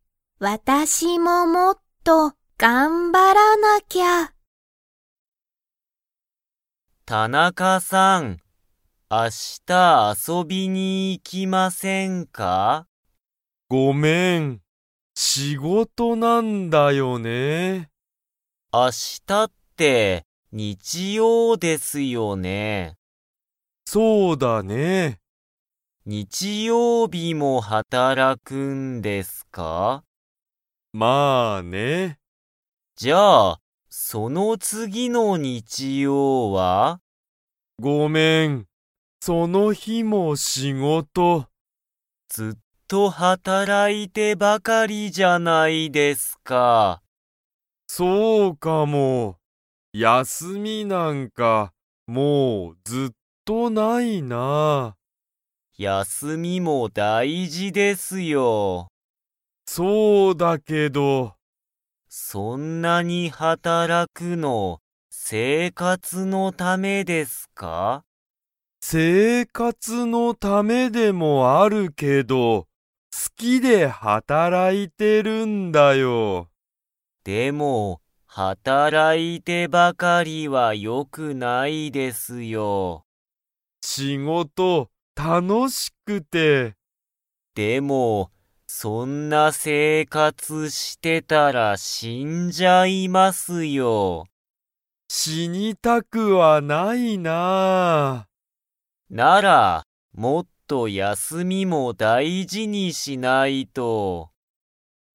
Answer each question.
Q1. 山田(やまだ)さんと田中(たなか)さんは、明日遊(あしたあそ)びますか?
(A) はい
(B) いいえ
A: B

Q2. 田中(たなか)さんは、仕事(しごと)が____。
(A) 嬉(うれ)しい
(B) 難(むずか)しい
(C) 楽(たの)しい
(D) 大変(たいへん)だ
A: C

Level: Level 2

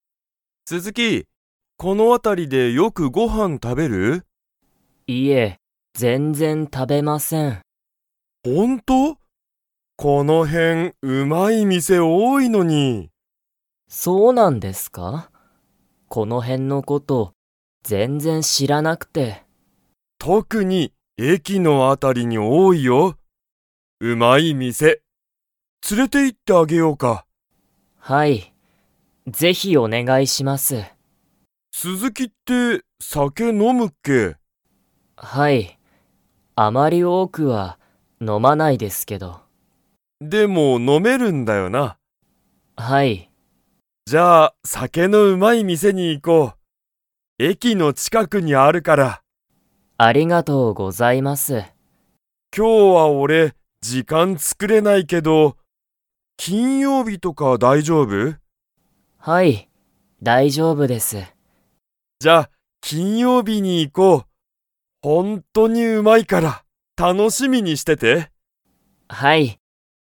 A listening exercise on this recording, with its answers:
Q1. うまい店(みせ)は、特(とく)にどこに多(おお)いですか?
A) 駅(えき)の辺(あた)り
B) 会社(かいしゃ)の前(まえ)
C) 斉藤(さいとう)さんの家(いえ)の辺(あた)り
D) 病院(びょういん)の近(ちか)く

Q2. 鈴木(すずき)さんはお酒(さけ)を 。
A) 多(おお)く飲(の)む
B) 多(おお)くは飲(の)まない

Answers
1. A
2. B

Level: Level 3

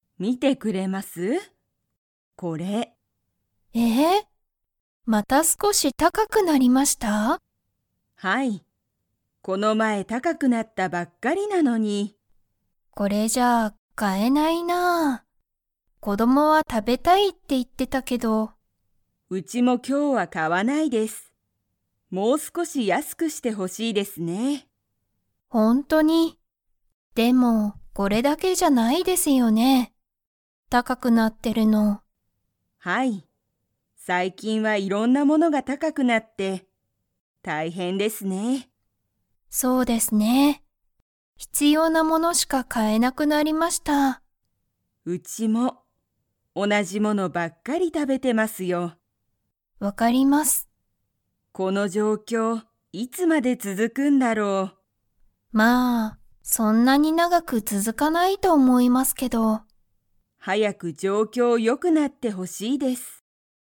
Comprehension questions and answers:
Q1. 最近(さいきん)は、いろんなものが安(やす)いですか?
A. はい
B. いいえ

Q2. 吉本(よしもと)さんは、____物(もの)ばっかり食(た)べている。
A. 高(たか)い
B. 美味おいしい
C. 同(おな)じ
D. いろんな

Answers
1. B
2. C

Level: Level 2

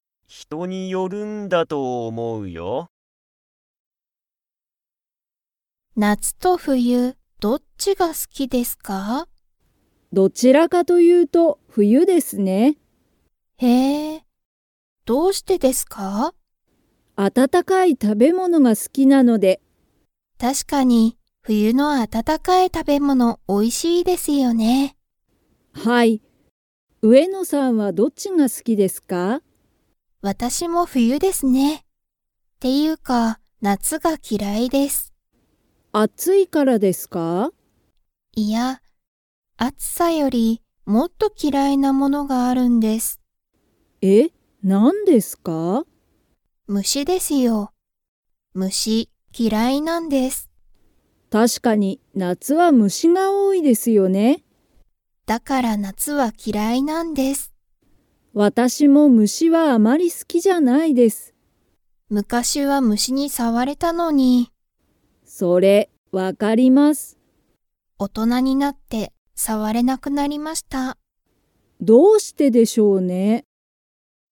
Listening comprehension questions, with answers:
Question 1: 前田まえださんは温あたたかい が好すき。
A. 運動うんどう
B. 食たべ物もの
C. 虫むし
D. 夏なつ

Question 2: 上野うえのさんは、今いま虫むしに触さわれますか?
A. はい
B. いいえ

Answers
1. B
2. B

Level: Level 4

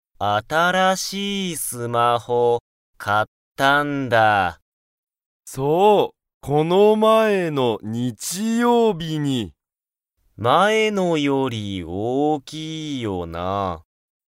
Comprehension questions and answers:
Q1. 新(あたら)しいスマホは、前(まえ)のより大(おお)きいですか?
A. はい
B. いいえ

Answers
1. B

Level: Level 1

